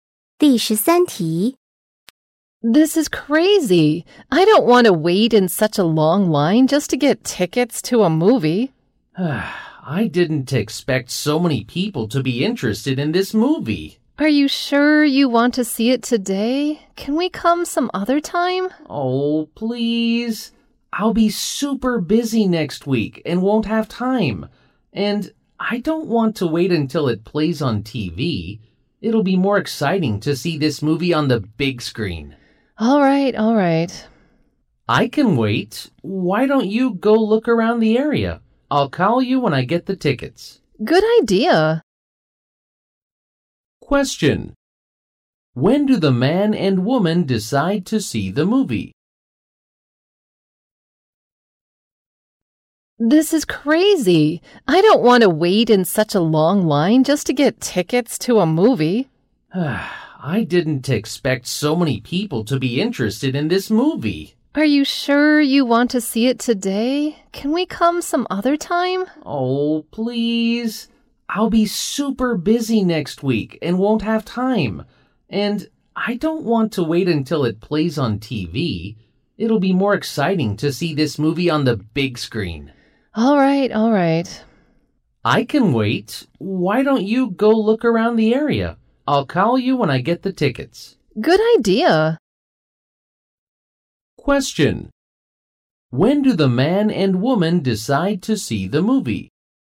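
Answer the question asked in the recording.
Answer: Today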